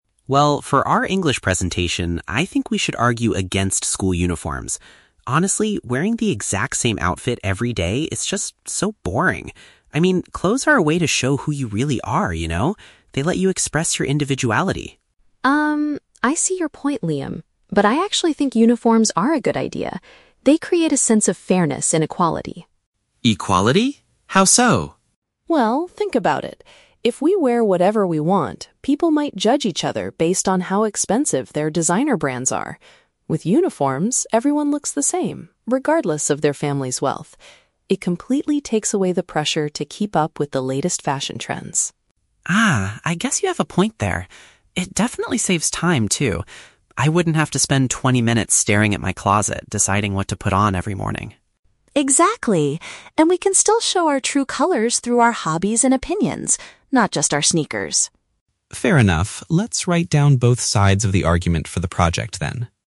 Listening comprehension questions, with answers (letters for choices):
Listen to the conversation between two students. For each question, choose the correct answer (A, B, or C).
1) What is Liam's initial argument against school uniforms?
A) They are physically uncomfortable to wear all day.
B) They prevent students from displaying their true personality.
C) They take far too much time to put on in the morning.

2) Why does Chloe support the idea of wearing uniforms?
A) They help students focus better and get higher grades in English.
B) They allow teenagers to easily follow the latest clothing trends.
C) They stop students from comparing each other's financial backgrounds.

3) What unexpected benefit of uniforms does Liam eventually agree with?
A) They make getting ready for school much faster.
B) They encourage students to develop new hobbies.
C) They look incredibly stylish on everyone.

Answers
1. B
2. C
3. A

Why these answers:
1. Liam says clothes are a way to "show who you really are" and "express your individuality" (paraphrased as "displaying their true personality"). Option A is plausible but never mentioned in the audio. Option C is a trap; Liam actually says uniforms save time in the morning, not take too much time.
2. Chloe explains that without uniforms, people judge each other based on "expensive designer brands," but uniforms make everyone look the same "regardless of their family's wealth" (paraphrased as "financial backgrounds"). Option A is a trap; "English" is mentioned, but only as the class they are doing a presentation for. Option B is a trap; she says uniforms take away the pressure to follow trends, not allow them to do so.
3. Liam agrees that wearing a uniform "saves time" because he wouldn't have to spend twenty minutes "deciding what to put on every morning." This is paraphrased as making getting ready "much faster." Option B is a trap; Chloe mentions "hobbies," but Liam does not say uniforms encourage new hobbies. Option C is a trap; Liam initially calls uniforms "boring," not stylish.

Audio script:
Liam: Well, for our English presentation, I think we should argue against school uniforms. Honestly, wearing the exact same outfit every day is just... so boring. I mean, clothes are a way to show who you really are, you know? They let you express your individuality.
Chloe: Um, I see your point, Liam. But I actually think uniforms are a good idea. They create a sense of fairness and equality.
Liam: Equality? How so?
Chloe: Well, think about it. If we wear whatever we want, people might judge each other based on how expensive their designer brands are. With uniforms, everyone looks the same, regardless of their family's wealth. It completely takes away the pressure to keep up with the latest fashion trends.
Liam: Ah, I guess you have a point there. It definitely saves time, too. I wouldn't have to spend twenty minutes staring at my closet, deciding what to put on every morning.
Chloe: Exactly! And we can still show our true colors through our hobbies and opinions, not just our sneakers.